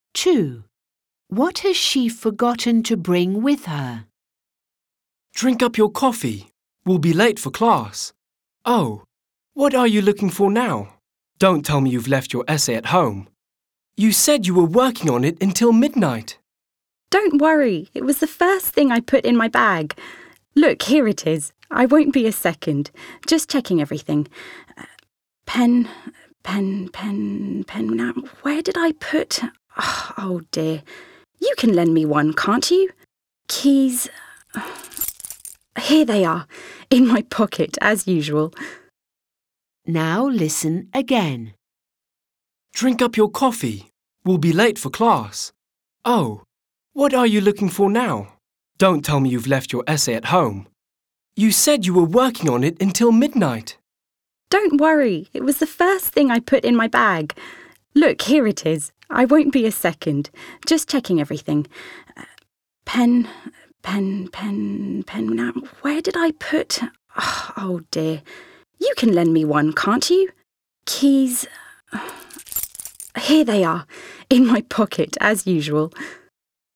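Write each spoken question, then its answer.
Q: What has she forgotten to bring with her?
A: A pen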